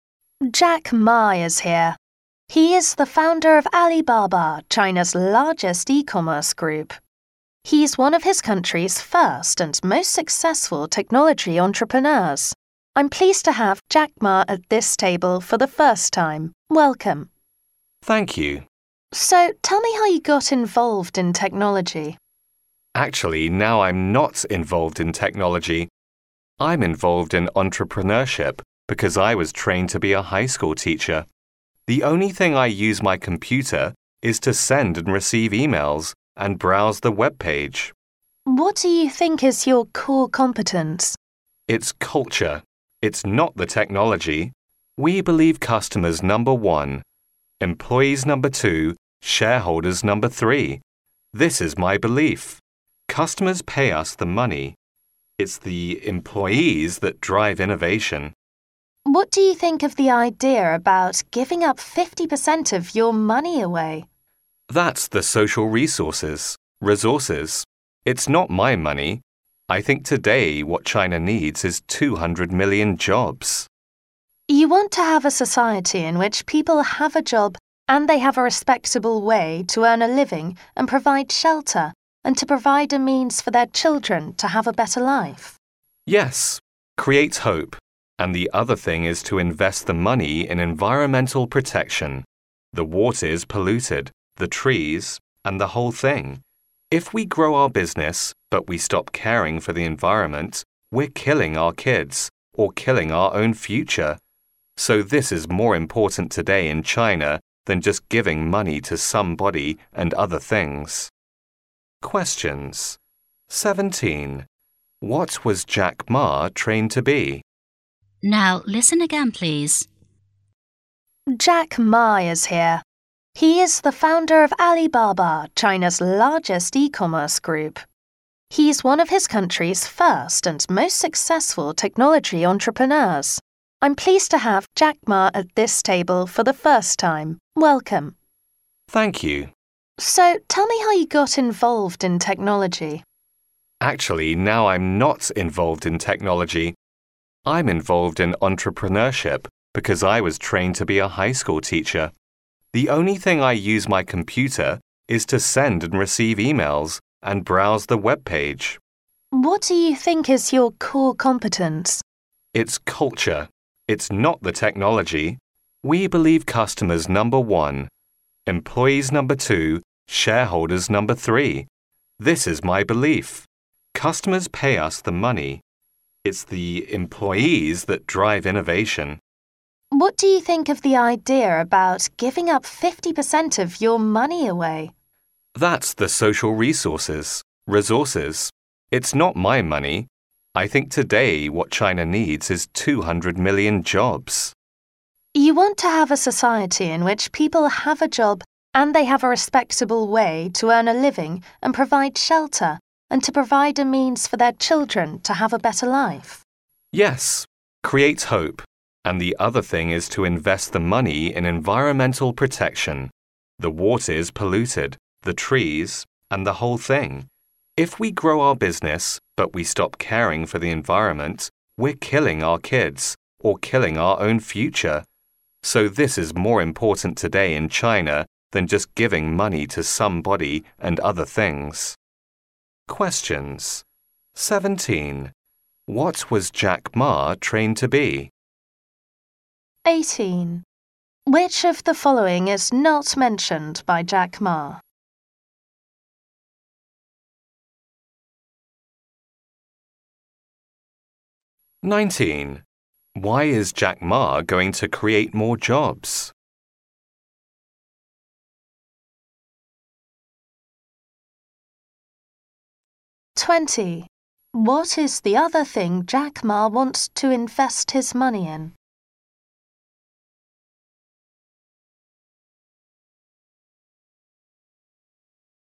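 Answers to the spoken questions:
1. A high school teacher
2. So people have a respectable way to earn a living and hope for a better life
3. Environmental protection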